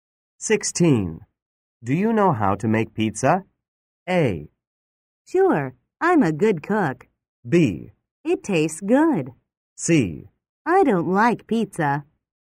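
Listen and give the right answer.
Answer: A: Sure, I'm a good cook.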